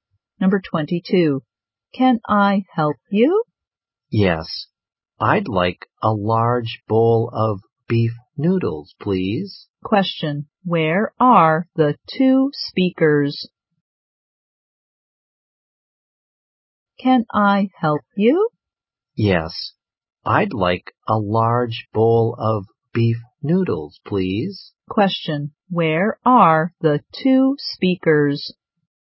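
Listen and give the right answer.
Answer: In a restaurant (noodle shop).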